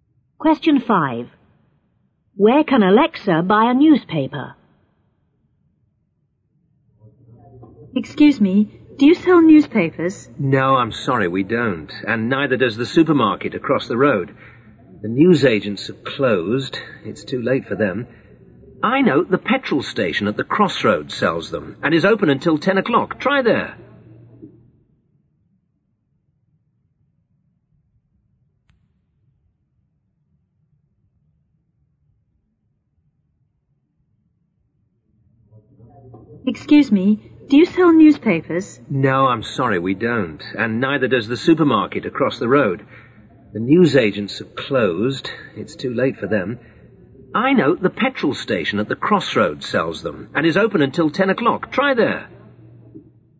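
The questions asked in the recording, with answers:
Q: Where can Alexa buy a newspaper?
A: At the petrol station at the crossroads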